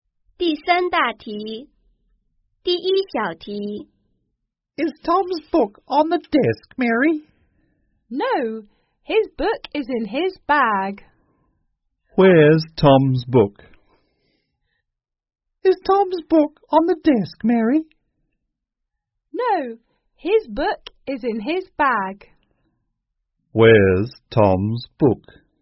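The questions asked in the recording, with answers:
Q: Where's Tom's book?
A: In his bag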